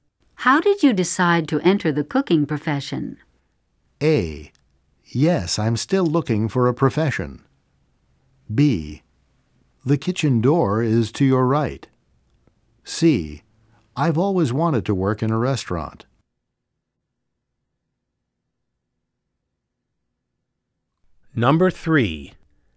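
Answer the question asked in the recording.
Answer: C: I've always wanted to work in a restaurant.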